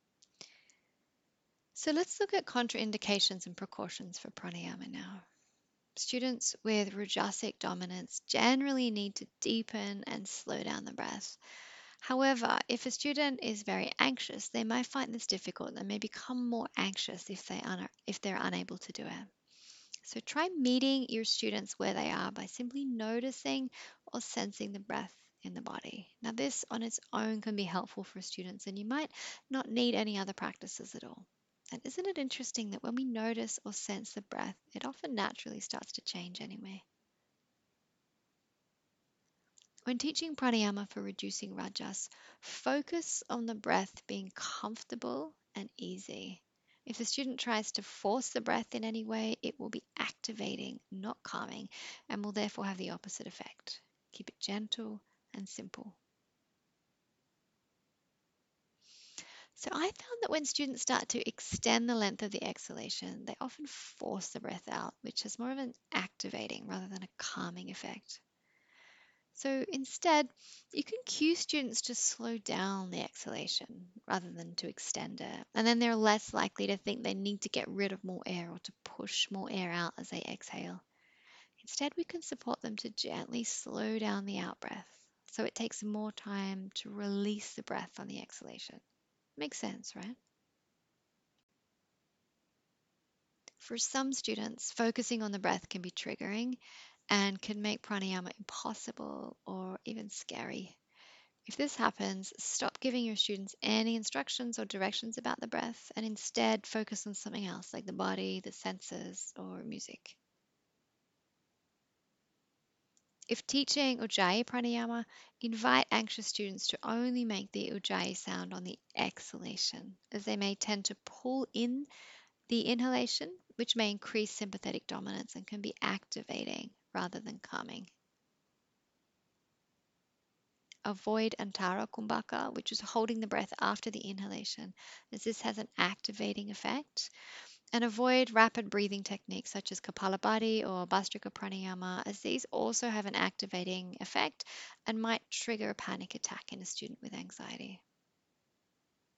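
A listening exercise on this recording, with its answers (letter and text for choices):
When teaching prāṇāyāma to students with a predominance of rajas, what can you do to reduce the likelihood of a student being triggered or experiencing an abreaction?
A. Focus on the breath being comfortable and easy, and without force.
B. If teaching ujjāyī prāṇāyāma, encourage students to only make the sound on the exhalation (not on the inhalation).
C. Avoid antāra kumbhaka and rapid breathing techniques such as kapālabhātī or bhastrika prāṇāyāma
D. All of the above.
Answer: D. All of the above.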